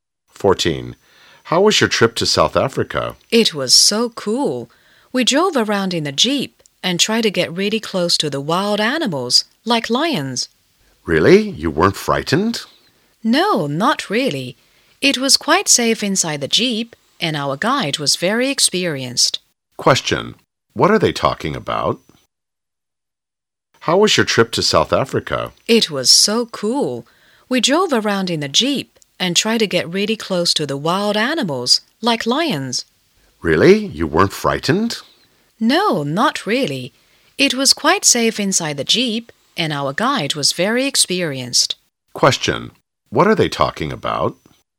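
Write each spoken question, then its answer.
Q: Question: What are they talking about?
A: A trip to South Africa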